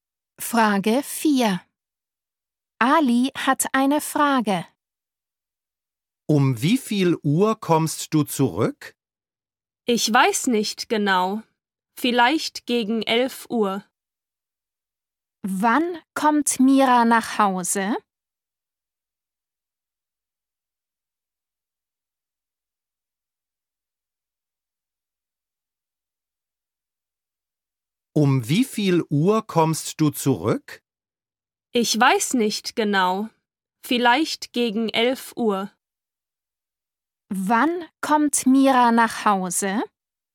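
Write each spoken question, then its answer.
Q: Wann kommt Mira nach Hause?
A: gegen 11 Uhr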